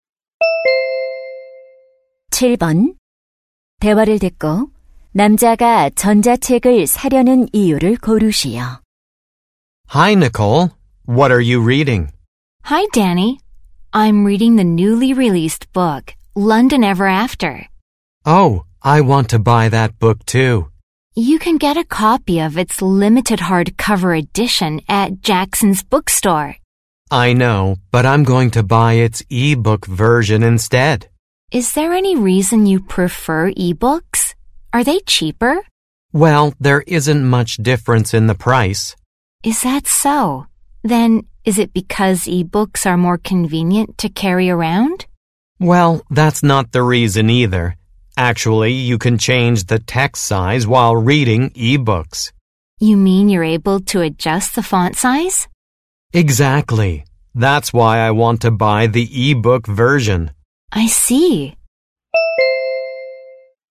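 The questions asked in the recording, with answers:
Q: 대화를 듣고 남자가 전자책을 사려는 이유를 고르시오.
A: 글자 크기를 조절할 수 있어서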